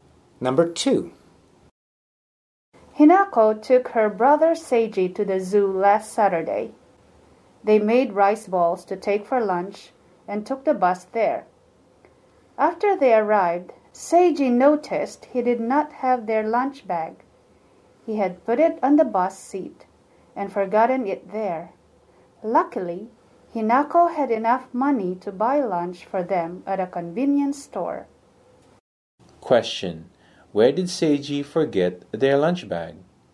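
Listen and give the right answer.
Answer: On the bus seat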